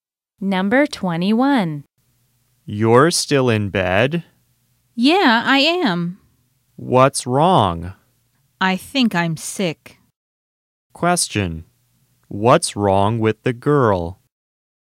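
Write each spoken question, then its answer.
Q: What's wrong with the girl?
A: She thinks she's sick.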